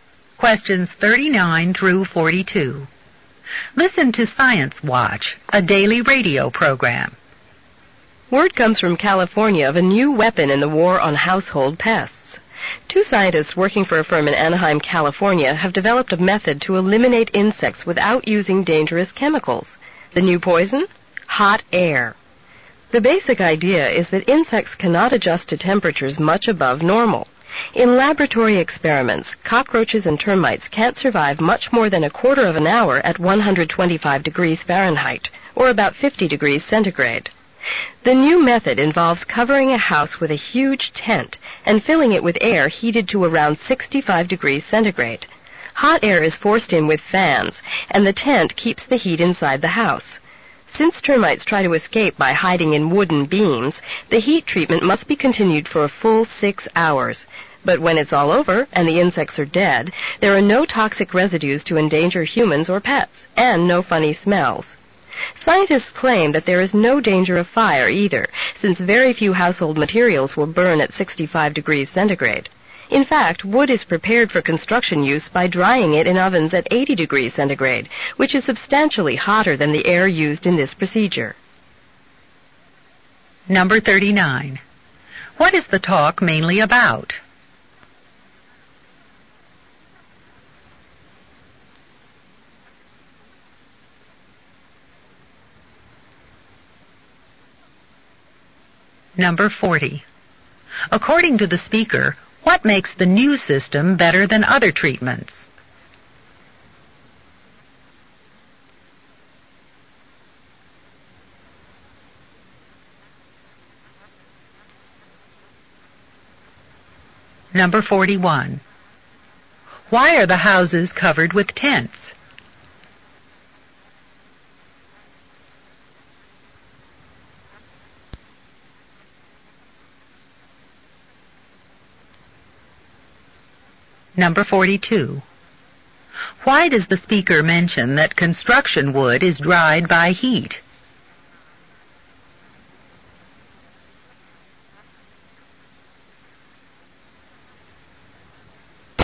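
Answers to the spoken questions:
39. A new method of killing household insects with hot air
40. It uses no dangerous chemicals, so it leaves no toxic residues or smells
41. To keep the hot air inside the house
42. To show the method is not a fire danger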